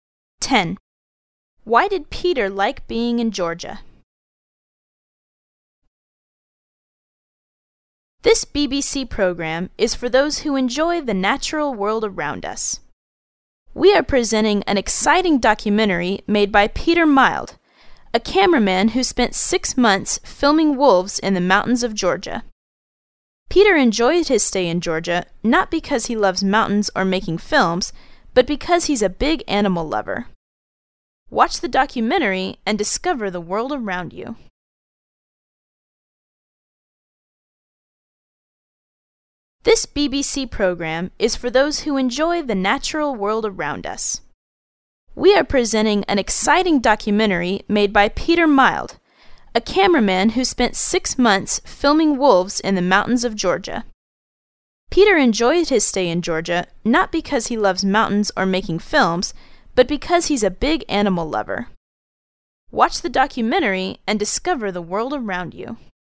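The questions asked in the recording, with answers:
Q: Why did Peter like being in Georgia?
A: Because he is a big animal lover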